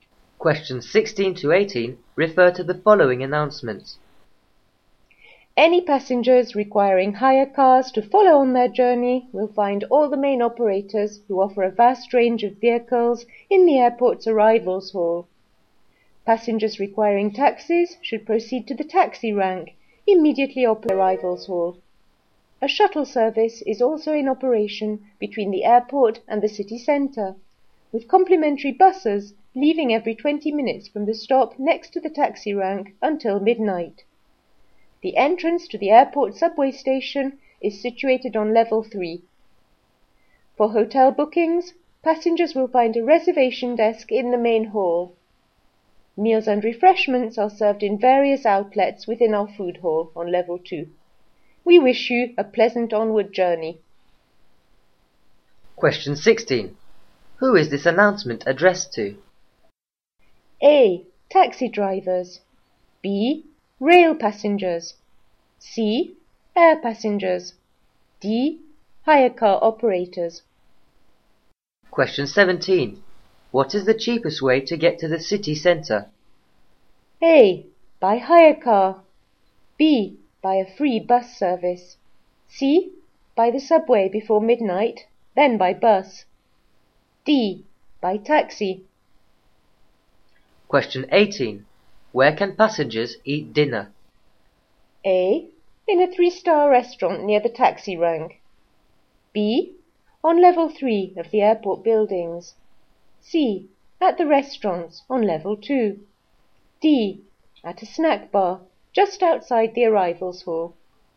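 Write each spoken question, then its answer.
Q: Who is this announcement addressed to?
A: C: Air passengers.

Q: What is the cheapest way to get to the city centre?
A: B: By a free bus service.

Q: Where can passengers eat dinner?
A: C: At the restaurants on level 2.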